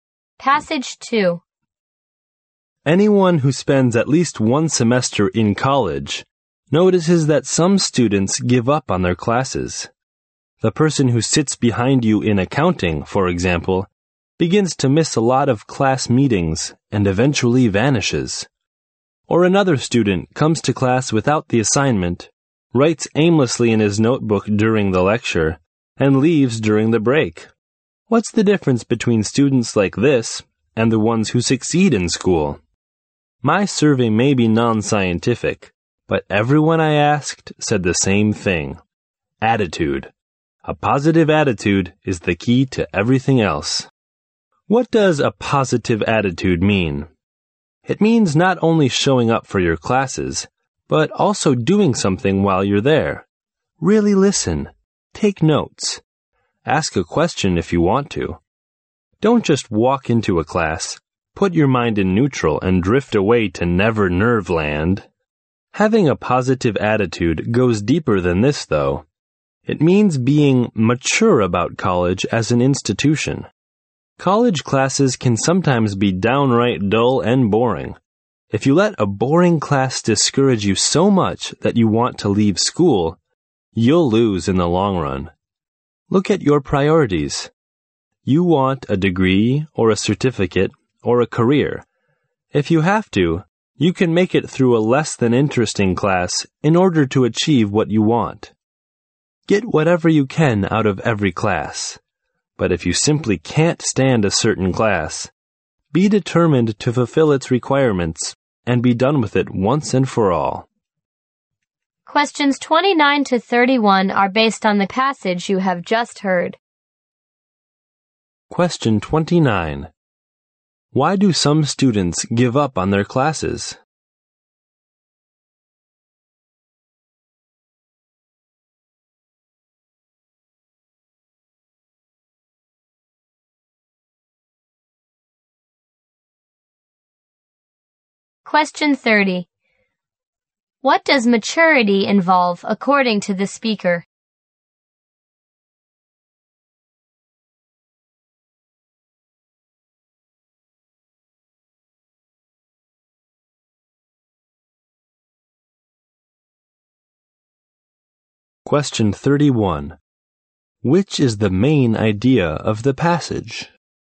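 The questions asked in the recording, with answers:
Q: Why do some students give up on their classes?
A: They lack a positive attitude

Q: Which is the main idea of the passage?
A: A positive attitude is the key to success in college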